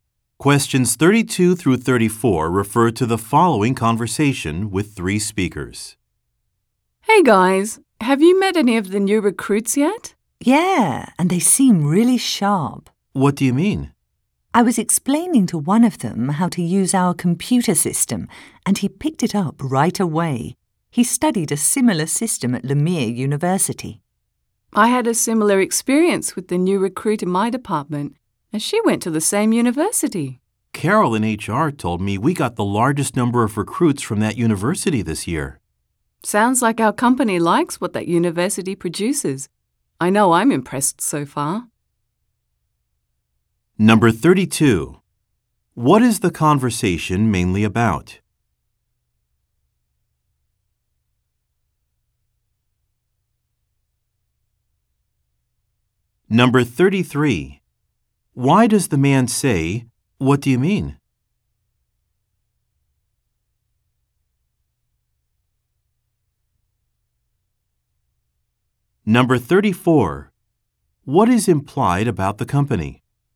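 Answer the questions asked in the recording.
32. The company's new recruits
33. To ask why the woman thinks the new recruits seem really sharp
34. It hires many graduates of Lemire University and likes them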